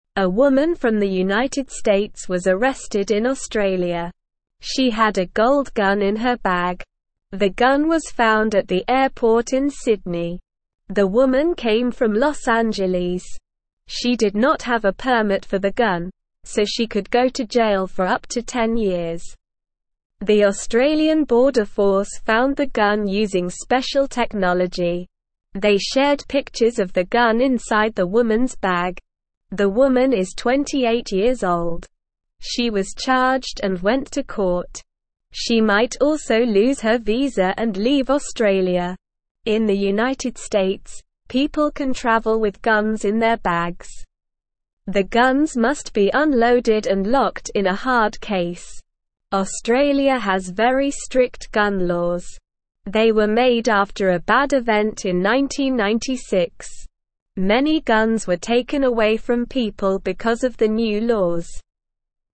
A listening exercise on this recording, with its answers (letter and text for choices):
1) A woman from the United States was arrested in (1)______.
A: Australia

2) The Australian Border Force found the gun using special (2)______.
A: technology

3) She was charged and went to (3)______.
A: court

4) The guns must be unloaded and locked in a (4)______ case.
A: hard

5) Many guns were taken away from people because of the new (5)______.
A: laws

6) Where was the woman arrested?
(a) Los Angeles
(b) New York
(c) Sydney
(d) London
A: (c) Sydney

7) How long could the woman go to jail?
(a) 5 years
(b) 2 years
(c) 10 years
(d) 20 years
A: (c) 10 years

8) Who found the gun?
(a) The police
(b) The Australian Border Force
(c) The airport security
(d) The woman's friend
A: (b) The Australian Border Force

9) How did they find the gun?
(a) They looked in her bag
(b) They used a dog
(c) They used special technology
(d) They asked her about it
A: (c) They used special technology

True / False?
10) A woman had a gold gun in her bag.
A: True

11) The woman found the gun at the airport.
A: False

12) She came from Los Angeles.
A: True

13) She had a permit for the gun.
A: False

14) The Australian Border Force found the gun.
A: True

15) The woman is 20 years old.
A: False

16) In the United States, people cannot travel with guns in their bags.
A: False

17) Australia has very strict gun laws.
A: True

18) Where was the gun found?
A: The gun was found at the airport in Sydney.

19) Where did the woman come from?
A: The woman came from Los Angeles.

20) Who found the gun at the airport?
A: The Australian Border Force found the gun.

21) Are gun laws in Australia strict or not strict?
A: Gun laws in Australia are very strict.

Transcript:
A woman from the United States was arrested in Australia. She had a gold gun in her bag. The gun was found at the airport in Sydney. The woman came from Los Angeles. She did not have a permit for the gun, so she could go to jail for up to 10 years.
The Australian Border Force found the gun using special technology. They shared pictures of the gun inside the woman's bag. The woman is 28 years old. She was charged and went to court. She might also lose her visa and leave Australia.
In the United States, people can travel with guns in their bags. The guns must be unloaded and locked in a hard case. They were made after a bad event in 1996. Many guns were taken away from people because of the new laws.

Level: Level 1